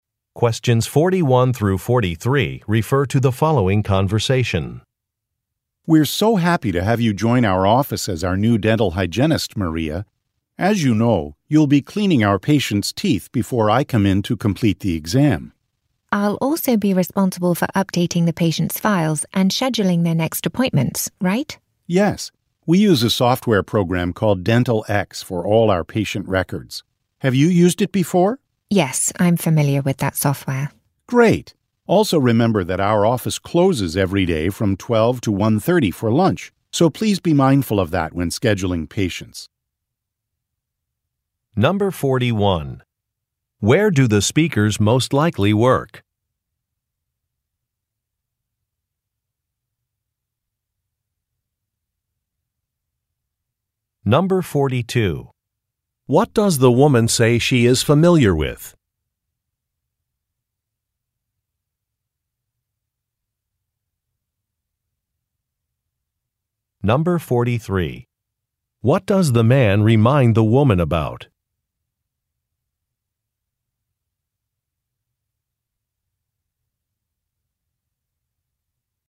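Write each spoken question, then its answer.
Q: Where do the speakers most likely work?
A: At a dental office

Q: What does the woman say she is familiar with?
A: A software program (Dental X)

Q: What does the man remind the woman about?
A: The office closes for lunch from 12 to 1:30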